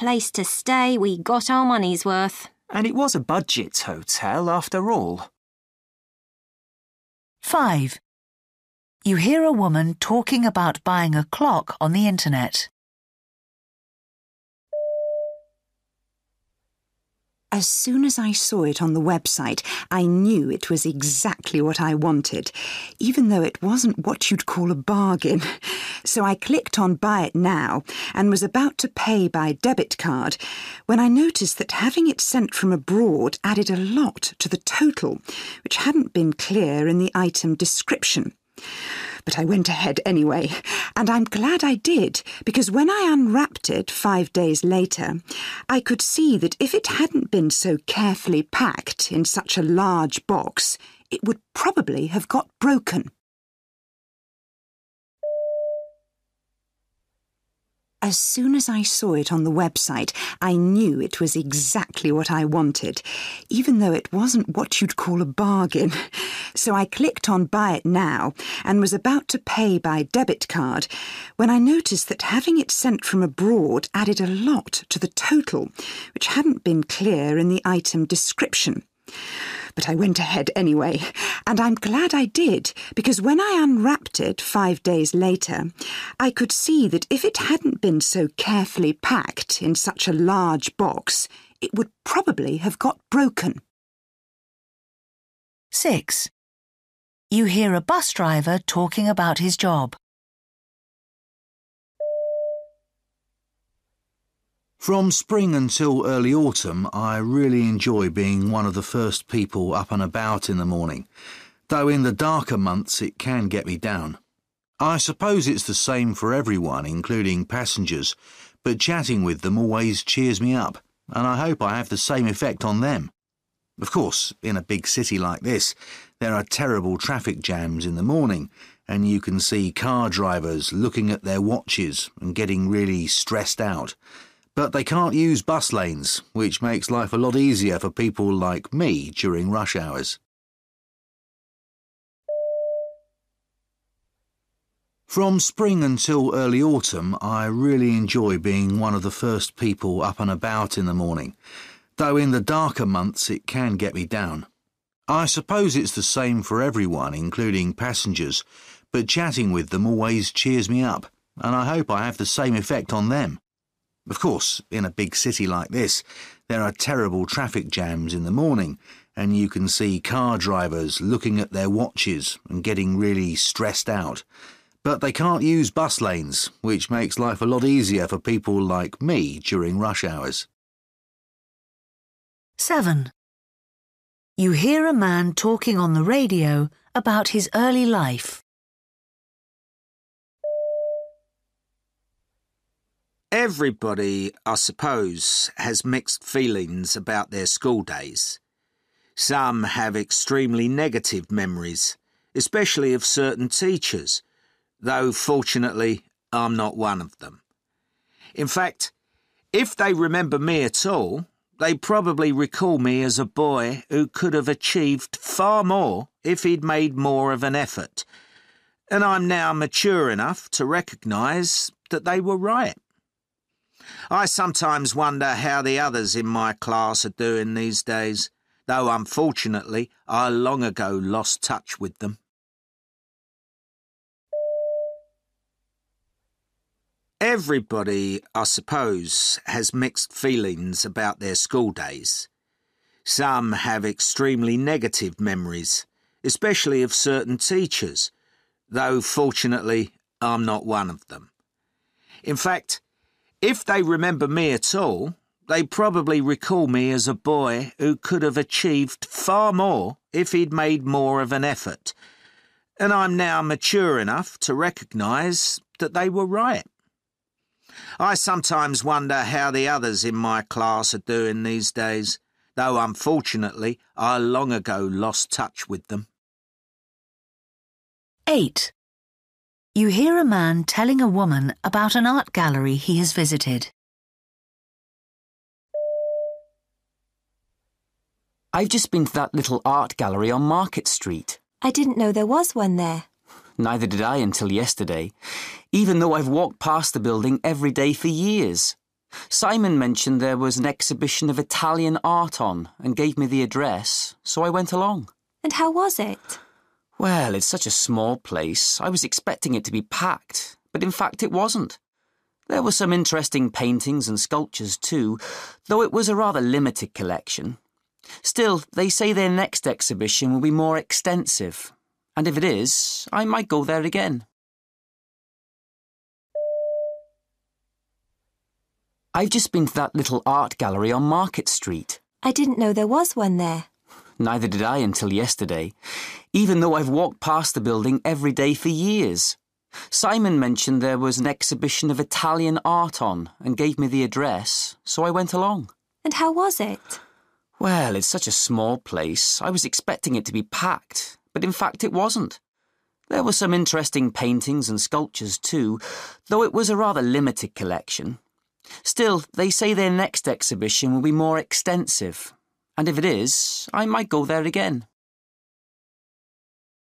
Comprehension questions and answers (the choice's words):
For questions 1-8, choose the best answer A, B or C.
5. What does she say about it?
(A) The clock had been damaged when it arrived.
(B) The postage cost more than she had expected.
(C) The item cost her less than what it was worth.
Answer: The postage cost more than she had expected.

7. What does he say about his school days?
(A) He regrets not studying harder.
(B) He remains friends with some classmates.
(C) He disliked some of his teachers.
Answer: He regrets not studying harder.

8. The man says the art gallery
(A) was too crowded.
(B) had recently moved.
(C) had too few works on display.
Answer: had too few works on display.

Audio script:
You don't have to climb a steep hill and then go up a flight of stairs to reception.
Man: But the view from our room out across the bay was marvellous, wasn't it?
Woman: It was hardly worth all that walking. Though I suppose as a place to stay we got our money's worth.
Man: And it was a budget hotel, after all.
5
As soon as I saw it on the website it knew it was exactly what I wanted, even though it wasn't what you'd call a bargain. So I clicked on 'buy it now' and was about to pay by debit card when I noticed that having it sent from abroad added a lot to the total, which hadn't been clear in the item description. But I went ahead anyway and I'm glad I did, because when I unwrapped it five days later I could see that if it hadn't been so carefully packed in such a large box it would probably have got broken.
6
From spring until early autumn I really enjoy being one of the first people up and about in the morning, though in the darker months it can get me down. I suppose it's the same for everyone including passengers, but chatting with them always cheers me up, and I hope I have the same effect on them. Of course, in a big city like this there are terrible traffic jams in the morning and you can see car drivers looking at their watches and getting really stressed out. But they can't use bus lanes, which make life a lot easier for people like me during rush hours.
7
Everybody, I suppose, has mixed feelings about their school days. Some have extremely negative memories, especially of certain teachers, though fortunately I'm not one of them. In fact, if they remember me at all, they probably recall me as a boy who could've achieved far more if he'd made more of an effort, and I'm now mature enough to recognise that they were right. I sometimes wonder how the others in my class are doing these days, though unfortunately I long ago lost touch with them.
8
Man: I've just been to that little art gallery on Market Street.
Woman: I didn't know there was one there.
Man: Neither did I until yesterday, even though I've walked past the building every day for years. Simon mentioned there was an exhibition of Italian art on and gave me the address, so I went along.
Woman: And how was it?
Man: Well, it's such a small place I was expecting it to be packed, but in fact it wasn't. There were some interesting paintings and sculptures, too, though it was a rather limited collection. Still, they say their next exhibition will be more extensive, and if it is I might go there again.